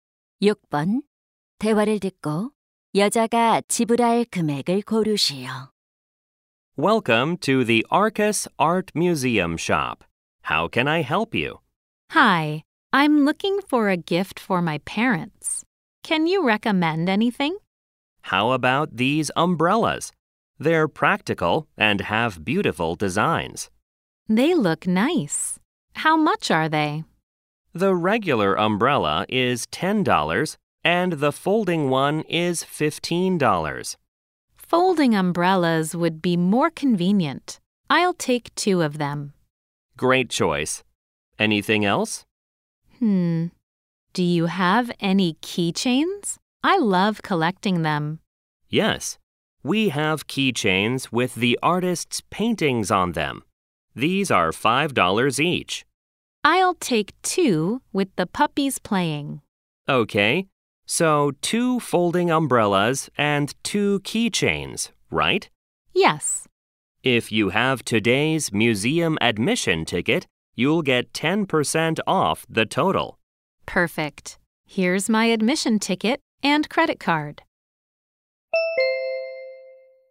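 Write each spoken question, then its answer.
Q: 대화를 듣고 여자가 지불할 금액을 고르시오.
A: $36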